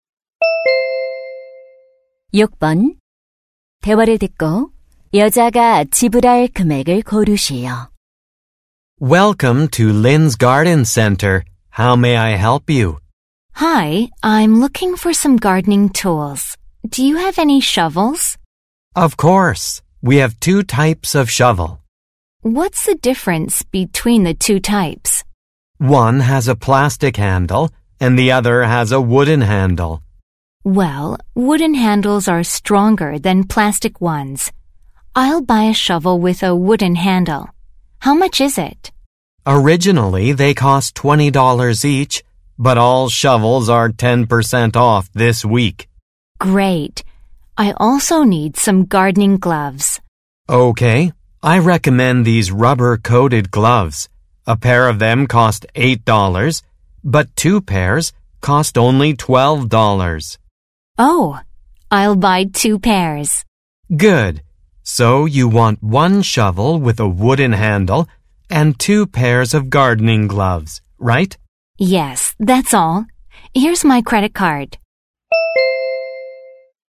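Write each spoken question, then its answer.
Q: 대화를 듣고 여자가 지불할 금액을 고르시오.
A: $30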